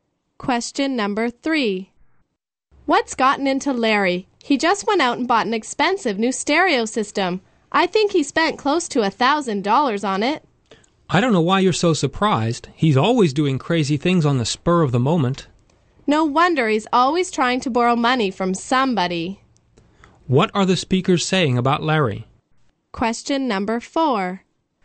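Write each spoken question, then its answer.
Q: What are the speakers saying about Larry?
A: He often acts on impulse and spends money carelessly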